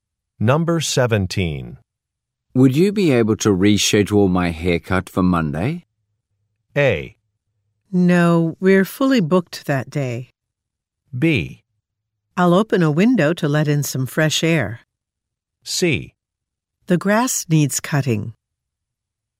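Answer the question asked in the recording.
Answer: A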